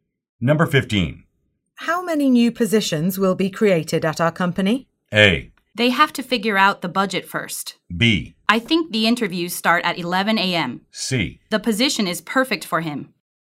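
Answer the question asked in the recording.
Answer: A: They have to figure out the budget first.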